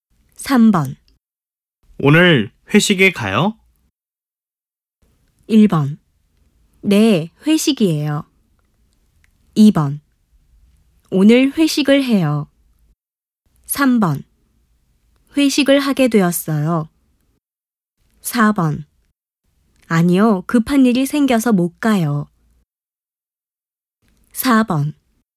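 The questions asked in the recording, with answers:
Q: 오늘 회식에 가요?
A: 4: 아니요, 급한 일이 생겨서 못 가요.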